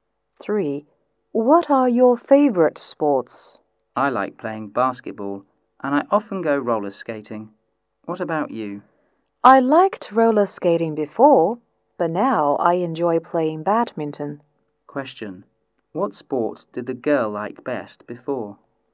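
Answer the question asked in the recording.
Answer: Roller skating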